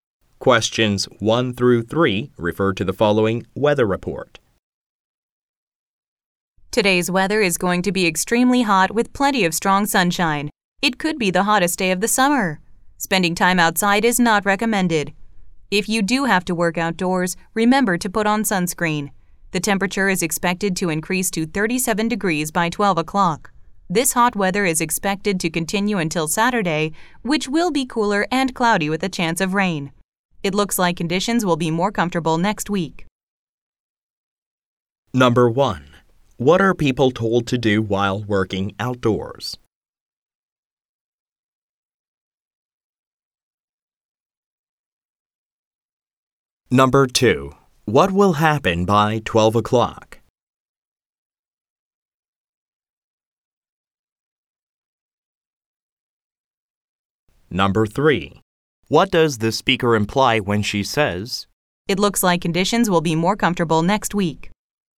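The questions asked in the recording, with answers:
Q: What are people told to do while working outdoors?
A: Put on sunscreen

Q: What will happen by 12 o'clock?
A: The temperature will rise to 37 degrees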